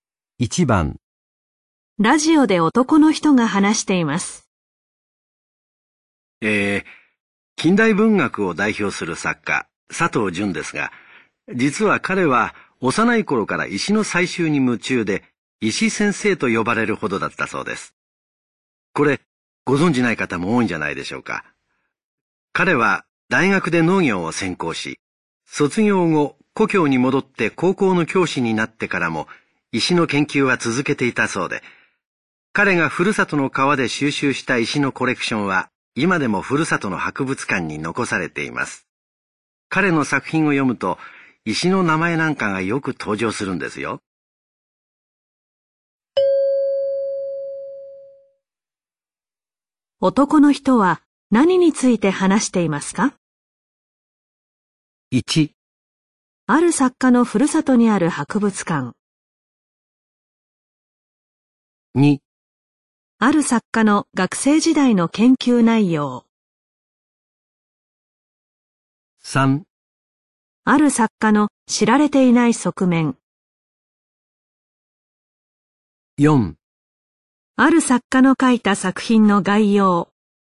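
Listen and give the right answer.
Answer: 3: ある作家の知られていない側面。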